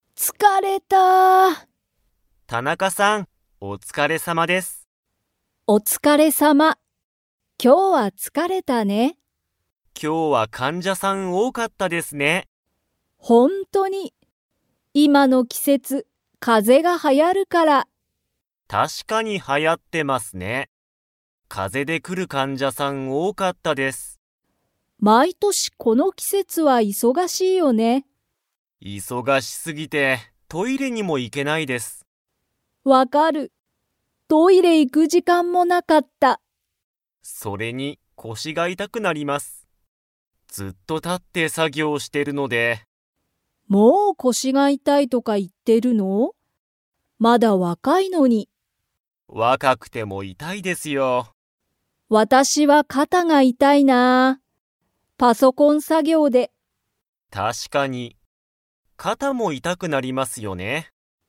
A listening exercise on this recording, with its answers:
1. 今日きょうは患者かんじゃさんが 。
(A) 多おおかった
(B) 少すくなかった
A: 多おおかった

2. 佐藤さとうさんは、体からだのどこが痛いたいですか?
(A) 腰こし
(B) 頭あたま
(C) 手て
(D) 足あし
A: 腰こし

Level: Level 4

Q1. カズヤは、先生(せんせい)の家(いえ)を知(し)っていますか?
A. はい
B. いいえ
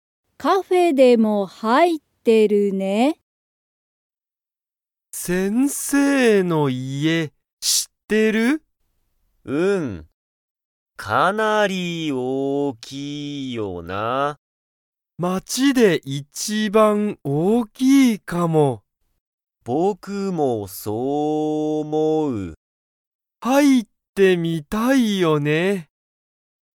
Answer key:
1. はい

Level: Level 1

